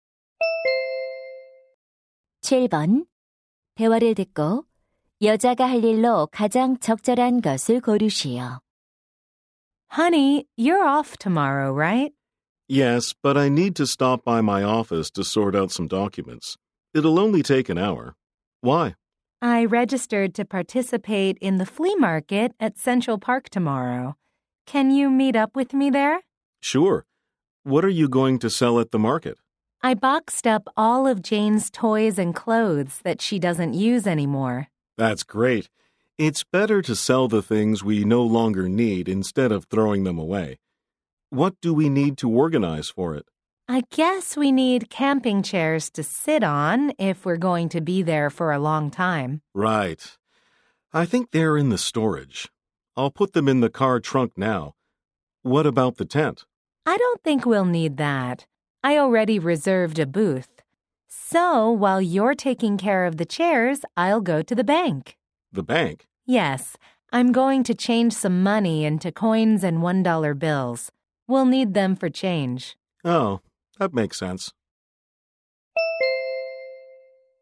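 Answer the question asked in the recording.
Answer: 은행에 가서 동전과 1달러 지폐로 환전하기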